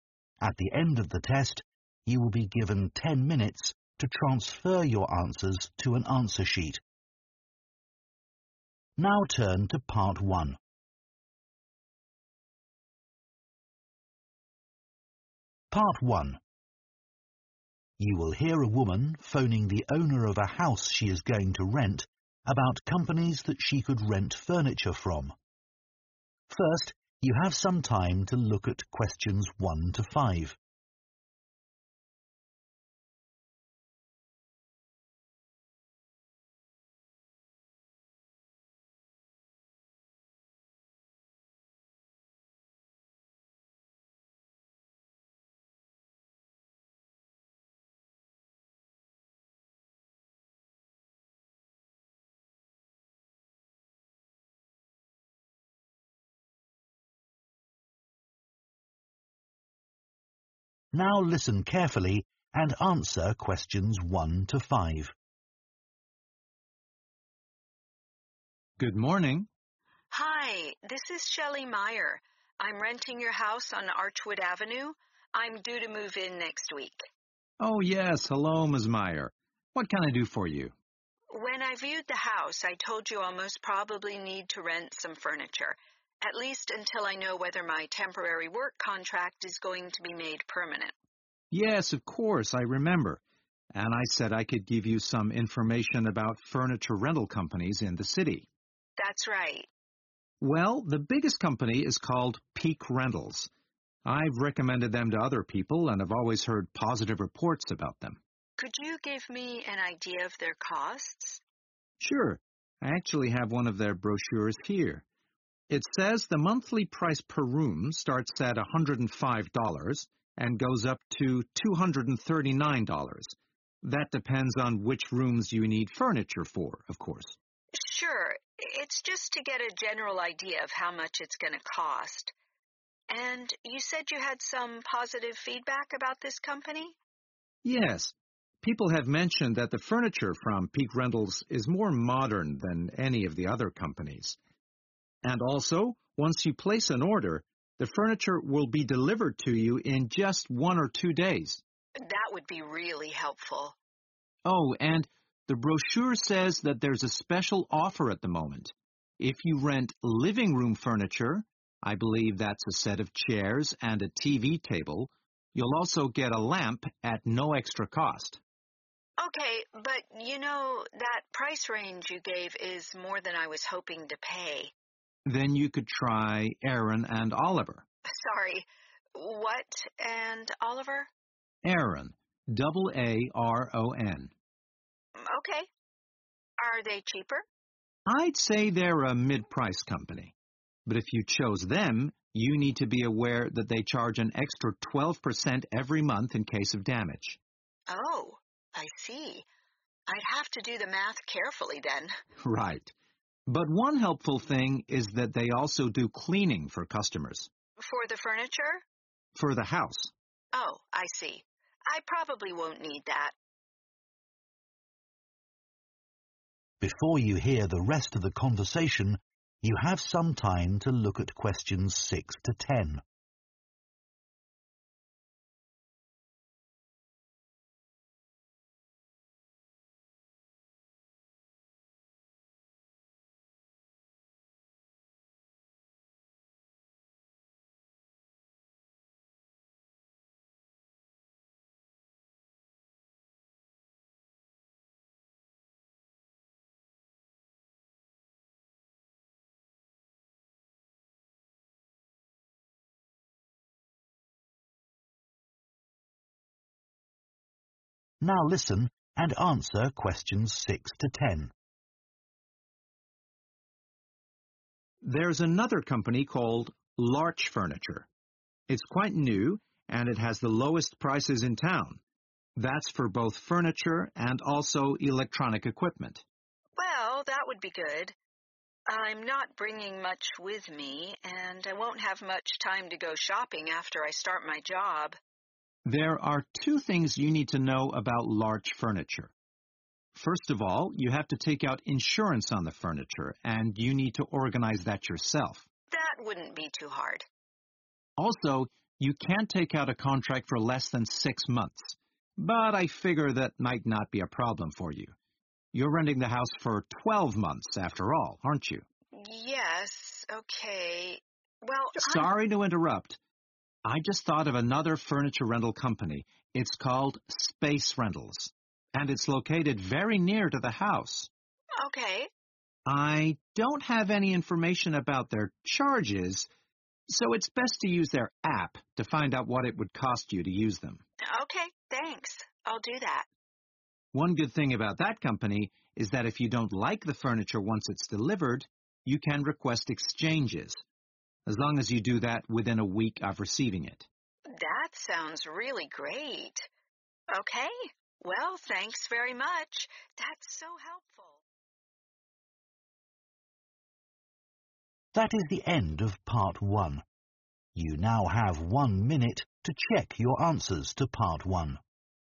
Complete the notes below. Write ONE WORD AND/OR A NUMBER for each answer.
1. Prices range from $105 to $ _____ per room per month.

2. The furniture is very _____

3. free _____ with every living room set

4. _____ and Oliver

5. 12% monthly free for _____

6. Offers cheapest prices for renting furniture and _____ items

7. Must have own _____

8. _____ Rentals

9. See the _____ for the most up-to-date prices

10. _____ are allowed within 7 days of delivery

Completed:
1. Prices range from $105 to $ 239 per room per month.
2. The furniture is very modern
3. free lamp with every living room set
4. Aaron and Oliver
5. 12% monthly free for damage
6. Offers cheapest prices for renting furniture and electronic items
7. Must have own insurance
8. space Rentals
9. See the app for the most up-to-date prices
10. exchanges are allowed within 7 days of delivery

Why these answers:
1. The correct answer is 239 because the transcript mentions that the prices at Peak Rentals range from $105 to $239. This shows that 239 is the maximum cost per room per month for renting furniture from this company.
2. The correct answer is 'modern' because the discussion about Peak Rentals mentions that people said their furniture is more modern than furniture from other companies. This shows that the furniture looks new and trendy.
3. The correct answer is 'lamp' because the man mentioned a special offer from Peak Rentals. If you rent living room furniture, you will get a lamp for free. This means that when you rent the furniture, they give you a lamp at no extra cost, which makes it a good deal for the customer.
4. The correct answer is 'Aaron' because the man mentioned that if Ms. Meyer found Peak Rentals to be more expensive, she could try 'Aaron' for furniture rental. He indicated that Aaron is a mid-range company, offering somewhat cheaper prices compared to Peak Rentals. This is important for Ms. Meyer since she is looking for affordable options.
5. The correct answer is 'damage' because in the conversation, the man explains that if you choose the company Aaron and Oliver, they charge an extra 12% every month to cover any damage to the furniture. This shows that 'damage' is an important term when discussing costs with this company.
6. The correct answer is 'electronic' because the transcript mentions that Larch Furniture has the lowest prices for both furniture and electronic equipment. This tells us that Larch Furniture lets you rent electronic items in addition to regular furniture.
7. The correct answer is 'insurance' because the man explains that for Larch Furniture, you need to take out insurance on the furniture. This means you have to buy protection for the rented furniture, which is important to understand when renting.
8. The correct answer is 'space' because the man mentions a company called Space Rentals while providing information about different furniture rental companies. He explains that this company is located near the house and that customers should check their app for prices.
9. The correct answer is 'app' because the man mentioned that you should use the app to find out how much Space Rentals charges. This means the app will give you the latest price information for that company.
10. The correct answer is 'exchanges' because the man mentioned that with Space Rentals, if you receive furniture and you don't like it, you can ask to change it for something else. This is allowed within a week after you get the furniture.

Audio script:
I'm renting your house on Archwood Avenue. I'm due to move in next week.
MAN Oh, yes. Hello, Ms. Meyer. What can I do for you?
WOMAN When I viewed the house, I told you I'll most probably need to rent some furniture, at least until I know whether my temporary work contract is going to be made permanent.
MAN Yes, of course. I remember. And I said I could give you some information about furniture rental companies in the city.
WOMAN That's right.
MAN Well, the biggest company is called Peak Rentals. I've recommended them to other people and have always heard positive reports about them.
WOMAN Could you give me an idea of their costs?
I actually have one of their brochures here. It says the monthly price per room starts at $105 and goes up to $239. That depends on which rooms you need furniture for, of course.
WOMAN Sure. It's just to get a general idea of how much it's going to cost. And you said you had some positive feedback about this company?
People have mentioned that the furniture from Peak Rentals is more modern than any of the other companies. And also, once you place an order, the furniture will be delivered to you in just one or two days.
WOMAN That would be really helpful.
MAN Oh, and the brochure says that there's a special offer at the moment. If you rent living room furniture, I believe that's a set of chairs and a TV table, you'll also get a lamp at no extra cost.
WOMAN Okay, but you know, that price range you gave is more than I was hoping to pay.
MAN Then you could try Aaron and Oliver.
WOMAN Sorry, what and Oliver?
MAN Aaron, double A-R-O-N
WOMAN OK, are they cheaper
MAN I say they are a mid company. But if you chose them you need to be aware that they charge an extra 12% every month in case of damage
WOMAN Oh, I see. I'd have to do the math carefully then.
MAN Right. But one helpful thing is that they also do cleaning for customers.
WOMAN For the furniture?
MAN For the house.
WOMAN Oh, I see. I probably won't need that.
MAN There's another company called Larch Furniture. It's quite new, and it has the lowest prices in town. That's for both furniture and also electronic equipment.
WOMAN Well, that would be good. I'm not bringing much with me, and I won't have much time to go shopping after I start my job.
MAN There are two things you need to know about large furniture. First of all you have to take out insurance on the furniture and you need to organize that yourself
WOMAN That wouldn't be too hard.
MAN Also you can take out a contract for less than six months but I figure that might not be a problem for you. You're renting the house for 12 months after all, aren't you?
WOMAN Yes, okay. Well, I...
MAN Sorry to interrupt. I just thought of another furniture rental company. It's called Space Rentals, and it's located very near to the house.
WOMAN Okay.
MAN I don't have any information about their charges, so it's best to use their app to find out what it would cost you to use them.
WOMAN Okay, thanks. I'll do that.
MAN One good thing about that company is that if you don't like the furniture once it's delivered, you can request exchanges, as long as you do that within a week of receiving it.
WOMAN That sounds really great. Okay, well, thanks very much. That's so helpful